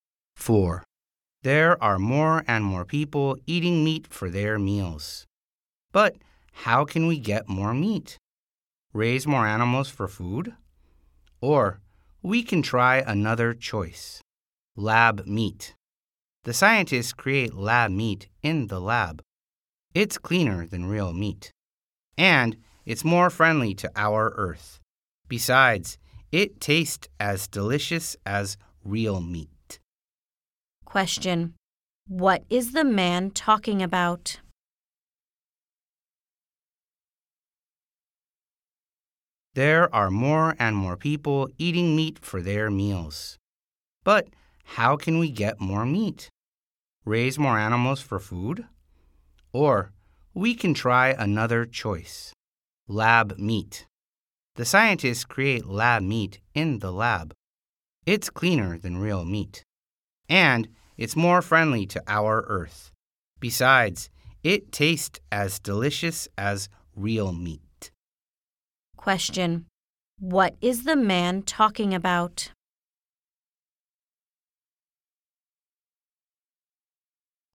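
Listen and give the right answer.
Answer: Lab meat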